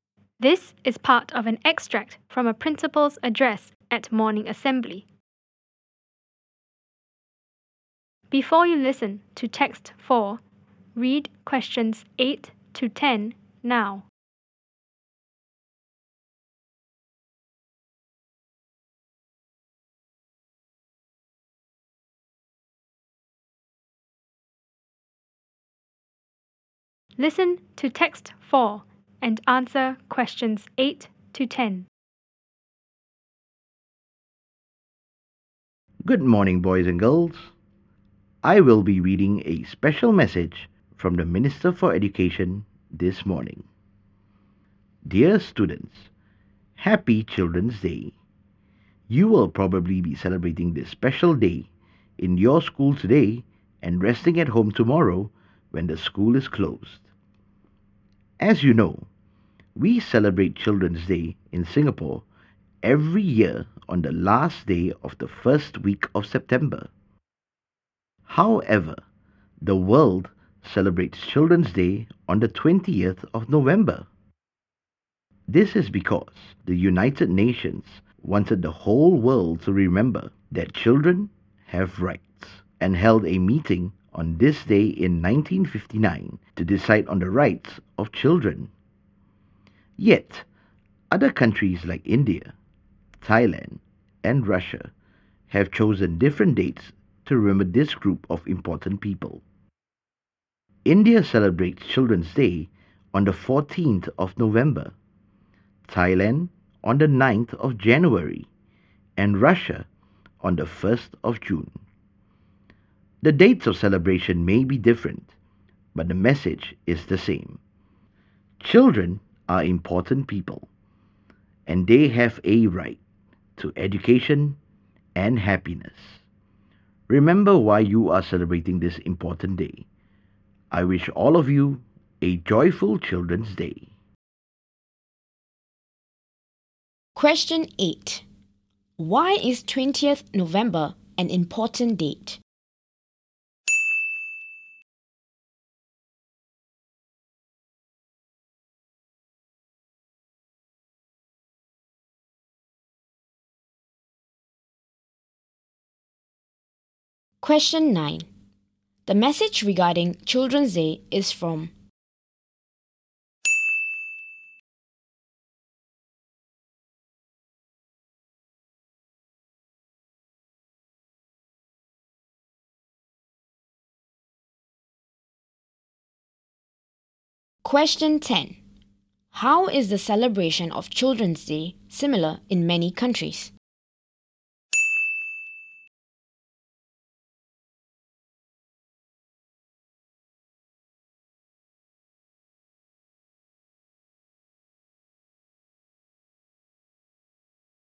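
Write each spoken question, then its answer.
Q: Why is 20th November an important date?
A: The United Nations held a meeting on that day in 1959 to decide on the rights of children.

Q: The message regarding Children's Day is from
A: the Minister for Education

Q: How is the celebration of Children's Day similar in many countries?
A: The message is the same: children are important and have a right to education and happiness.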